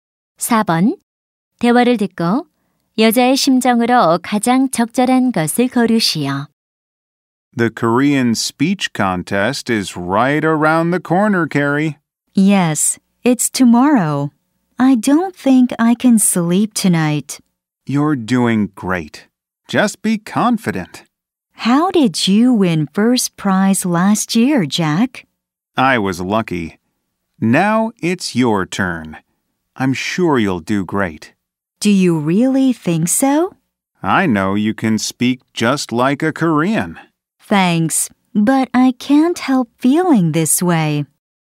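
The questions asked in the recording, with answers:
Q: 대화를 듣고 여자의 심정으로 가장 적절한 것을 고르시오.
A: 긴장됨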